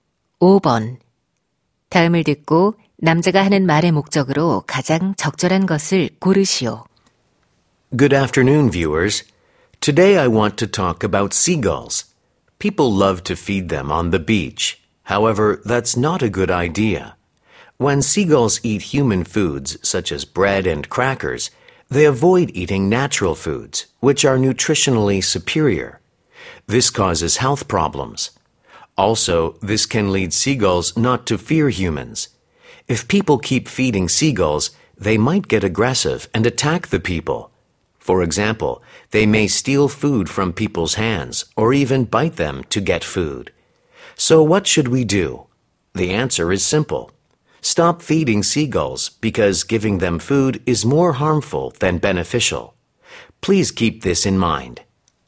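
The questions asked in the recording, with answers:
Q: 다음을 듣고 남자가 하는 말의 목적으로 가장 적절한 것을 고르시오.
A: 갈매기에게 먹이를 주지 말 것을 당부하려고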